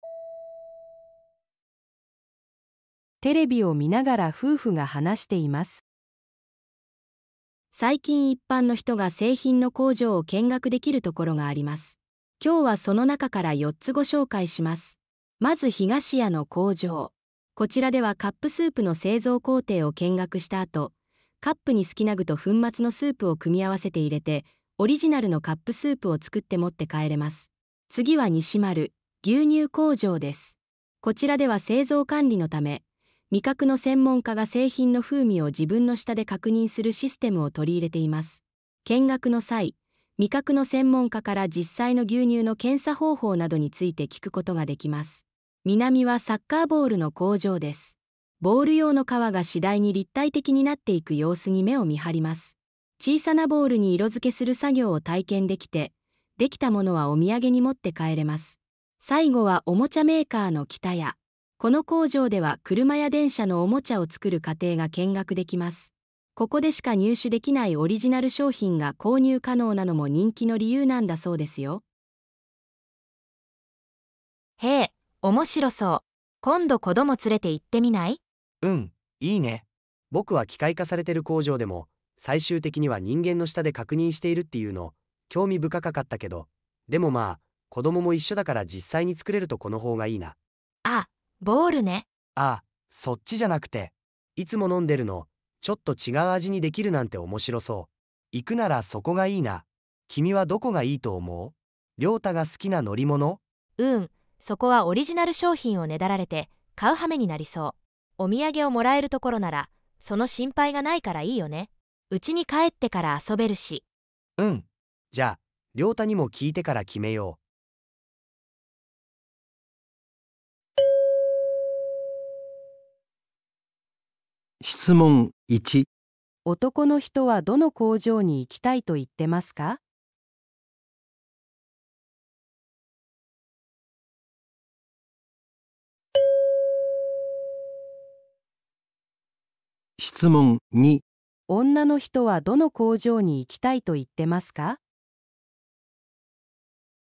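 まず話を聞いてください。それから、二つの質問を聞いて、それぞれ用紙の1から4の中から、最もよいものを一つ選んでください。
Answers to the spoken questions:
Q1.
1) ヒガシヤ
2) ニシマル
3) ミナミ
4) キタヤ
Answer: 1) ヒガシヤ
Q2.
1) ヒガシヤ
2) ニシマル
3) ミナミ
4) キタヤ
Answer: 3) ミナミ

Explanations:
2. 妻子提议「ボールね」指向南工厂。 后续强调「免费纪念品无购买压力」,南厂符合条件(涂色体验成品可带走,无需额外消费)。 对于北谷则担心消费,对于东屋则未明确支持。

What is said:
こちらでは製造管理のため味覚の専門家が、製品の風味を自分の舌で確認するシステムを取り入れています。見学の際、味覚の専門家から実際の牛乳の生産方法などについて聞くことができます。
ミナミはサッカーボールの工場です。ボール用の皮が次第に立体的になっていく様子に目を見張ります。小さなボールに色付けする作業を体験できて、できたものはお土産に持って帰れます。
最後はおもちゃメーカーのキタヤ。この工場では車や電車のおもちゃを作る過程が見学できます。ここでしか入手できないオリジナル商品が購入可能なのも人気の理由なんだそうですよ。
女:ヘー、面白そう。今度子供を連れて行ってみない?
男:うん、いいね。僕は機械化されてる工場でも最終的には人間の舌で確認しているっていうの興味深かかったけど。でも、まぁ子供も一緒だから実際に作れるところの方がいいな。
女:あ、ボールね。
男:あ、そっちじゃなくて。いつも飲んでるのとちょっと違う味にできるなんて面白そう。行くならそこがいいな。君はどこがいいと思う?涼太が好きな乗り物?
女:うーん、そこはオリジナル商品をねだられて買う羽目になりそう。お土産をもらえるところならその心配がないからいいよね。うちに帰ってから遊べるし。
男:うん、じゃあ涼太にも聞いてから決めよう。

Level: N1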